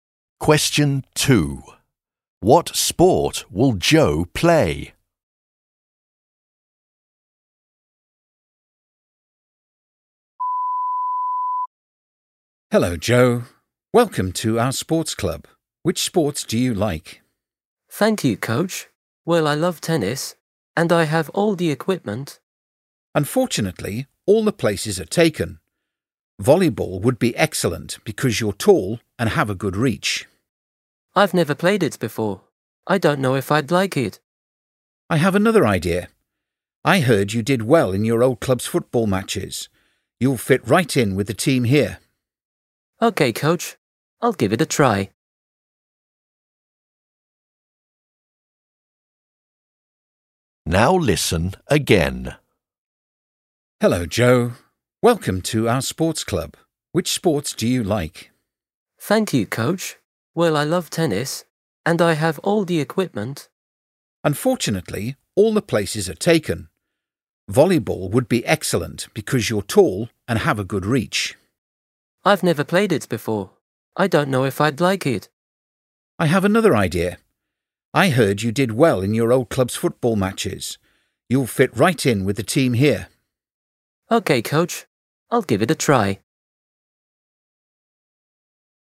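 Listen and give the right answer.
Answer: Football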